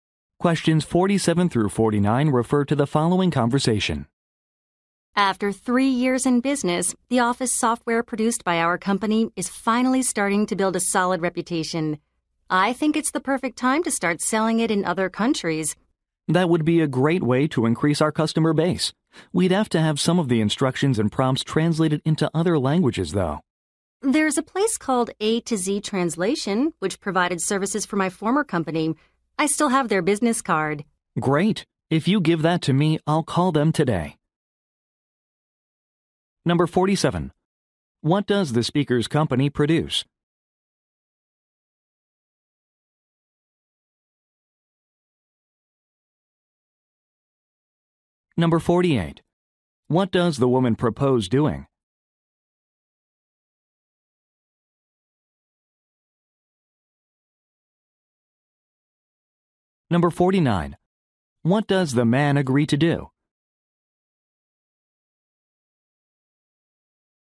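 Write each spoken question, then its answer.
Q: What does the speaker's company produce?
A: Office software

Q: What does the woman propose doing?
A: Selling the software in other countries

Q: What does the man agree to do?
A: Call a translation company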